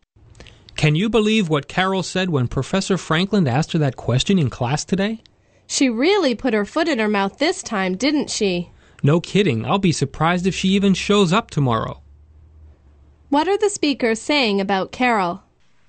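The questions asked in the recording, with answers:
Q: What are the speakers saying about Carol?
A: She said something embarrassing in class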